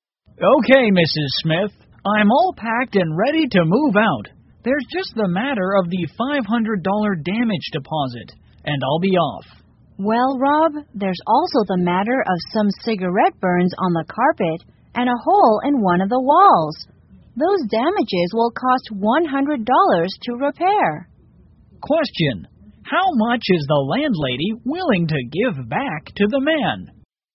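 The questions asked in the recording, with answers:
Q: How much is the landlady willing to give back to the man?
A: $400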